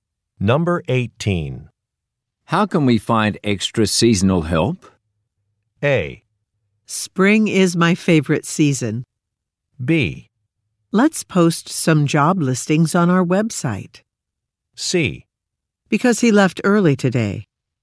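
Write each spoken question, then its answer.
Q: How can we find extra seasonal help?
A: B: Let's post some job listings on our website.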